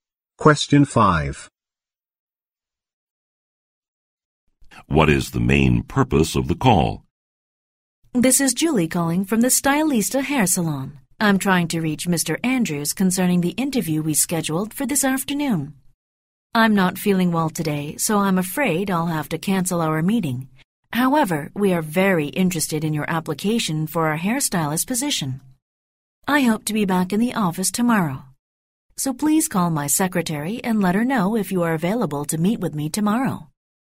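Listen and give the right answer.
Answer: To cancel the interview and reschedule it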